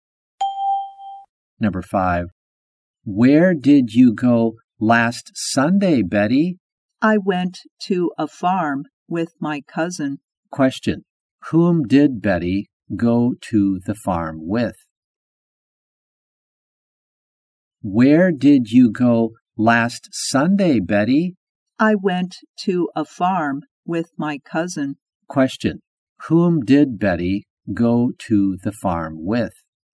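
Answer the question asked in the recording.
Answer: Her cousin.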